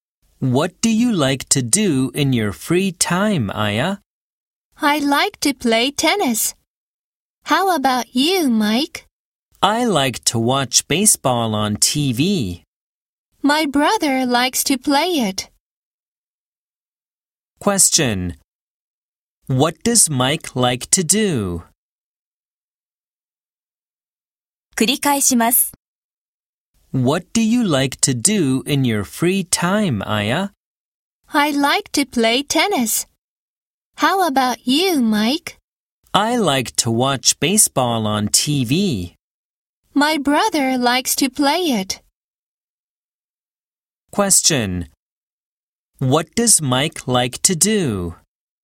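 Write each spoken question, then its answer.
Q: What does Mike like to do?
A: Watch baseball on TV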